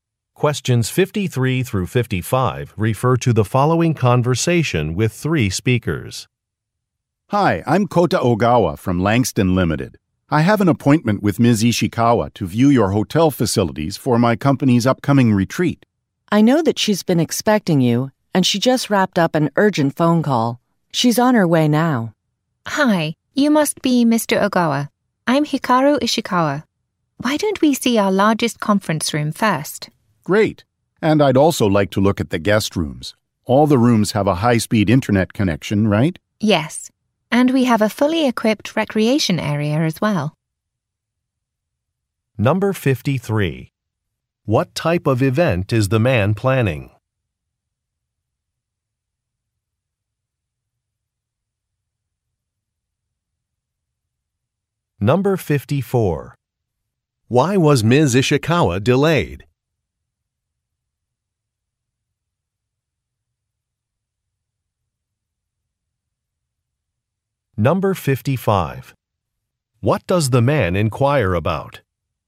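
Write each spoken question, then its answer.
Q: What type of event is the man planning?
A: A company retreat

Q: Why was Ms. Ishikawa delayed?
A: She was on an urgent phone call

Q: What does the man inquire about?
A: High-speed internet in the rooms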